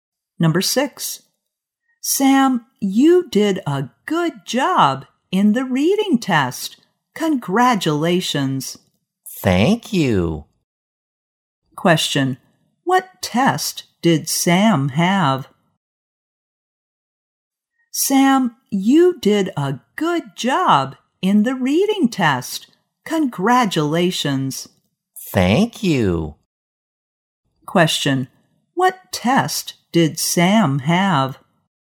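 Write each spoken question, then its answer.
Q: What test did Sam have?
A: A reading test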